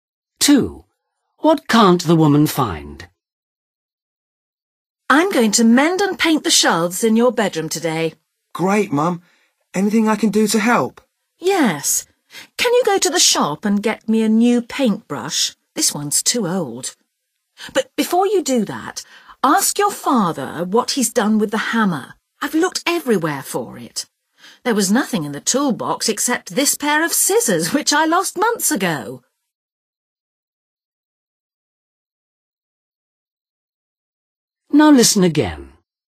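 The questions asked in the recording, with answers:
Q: What can't the woman find?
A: the hammer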